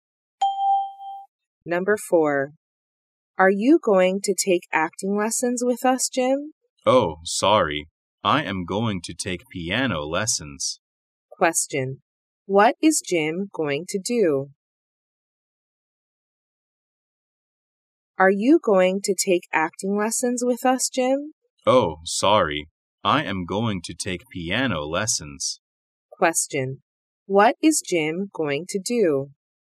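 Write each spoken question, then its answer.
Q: What is Jim going to do?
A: Take piano lessons.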